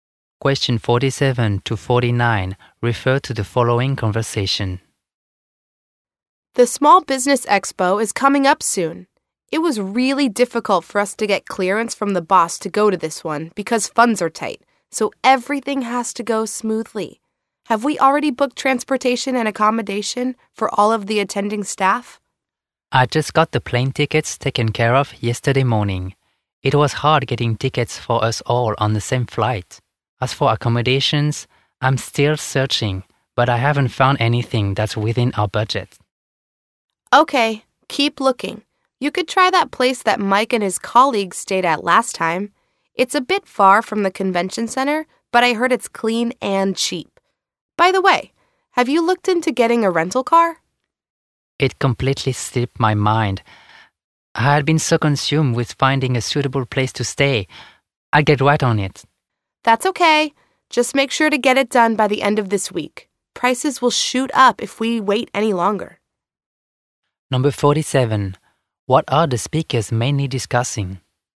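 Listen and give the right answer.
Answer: Travel arrangements for the Small Business Expo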